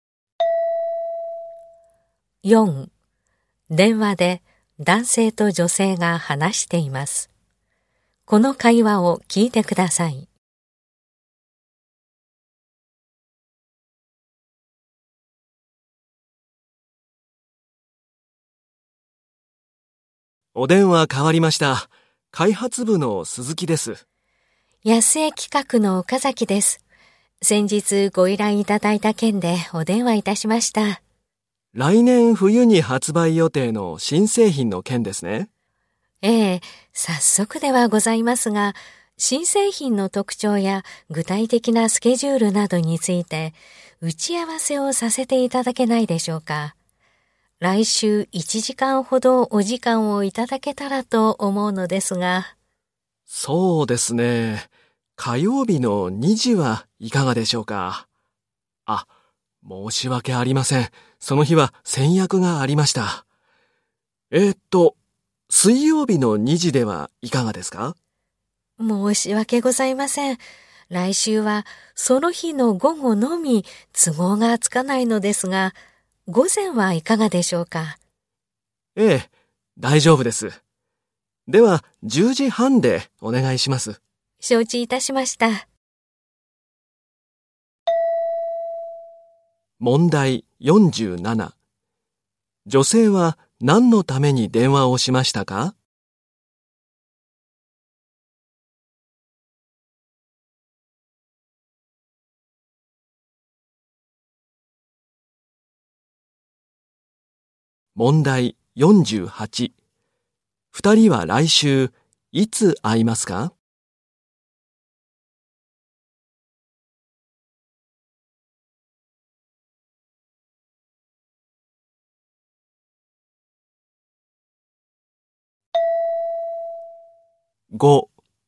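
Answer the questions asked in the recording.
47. 新製品についての打ち合わせの日時を決めるため
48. 水曜日の午前10時半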